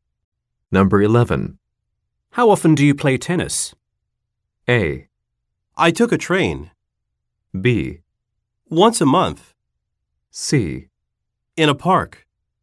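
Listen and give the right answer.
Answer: B: Once a month.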